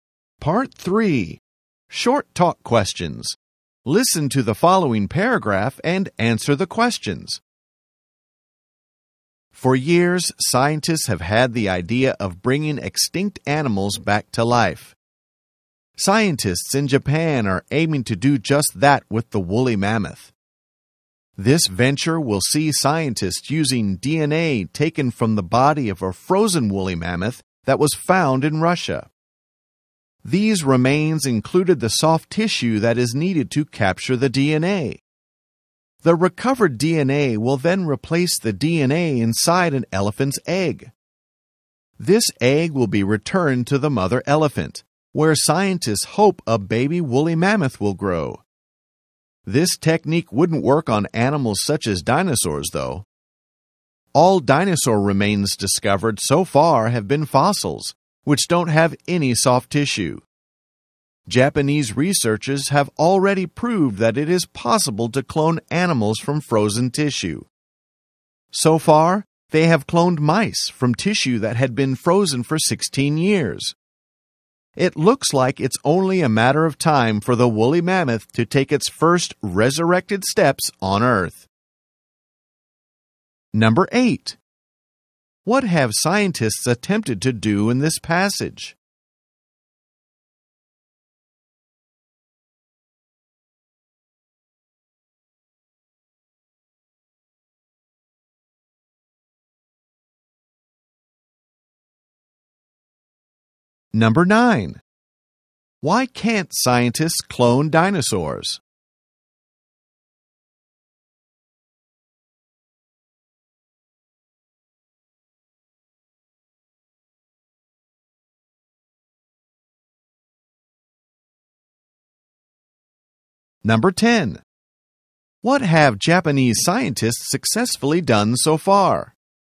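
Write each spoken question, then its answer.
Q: What have scientists attempted to do in this passage?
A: Bring the woolly mammoth back to life by cloning.

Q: Why can't scientists clone dinosaurs?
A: Dinosaur remains are fossils with no soft tissue.

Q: What have Japanese scientists successfully done so far?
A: Cloned mice from tissue frozen for 16 years.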